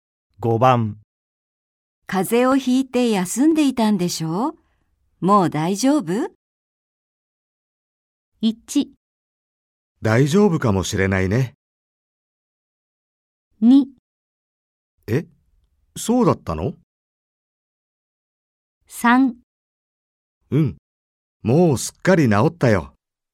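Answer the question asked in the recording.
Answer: 3: うん。もうすっかり治ったよ。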